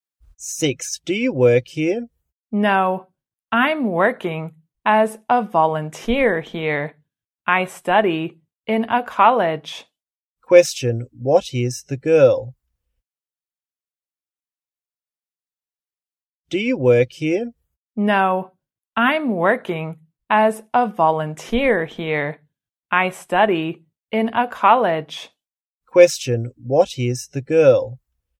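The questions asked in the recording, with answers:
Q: what is the girl?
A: A college student (volunteer)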